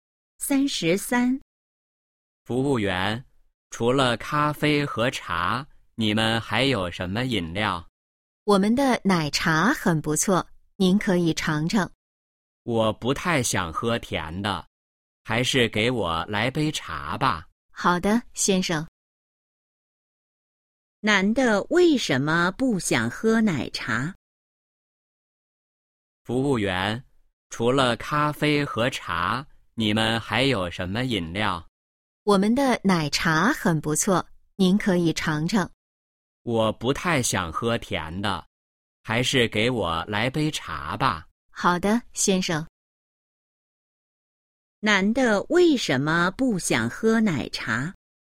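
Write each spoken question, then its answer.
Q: 男的为什么不想喝奶茶?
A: 不想喝甜的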